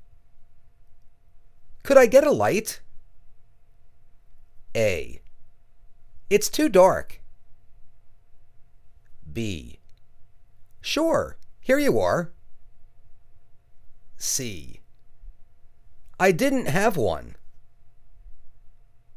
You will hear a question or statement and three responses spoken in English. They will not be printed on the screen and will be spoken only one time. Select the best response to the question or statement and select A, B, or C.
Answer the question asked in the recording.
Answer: Sure, here you are.